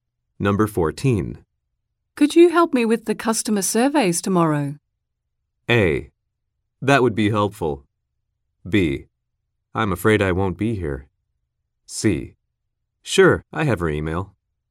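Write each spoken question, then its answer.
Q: Could you help me with the customer surveys tomorrow?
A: B: I'm afraid I won't be here.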